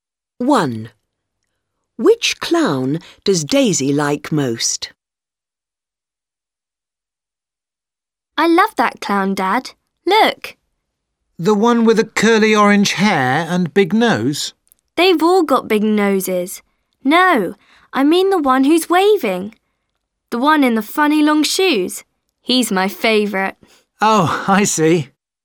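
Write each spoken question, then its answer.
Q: Which clown does Daisy like most?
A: The one who's waving, in the funny long shoes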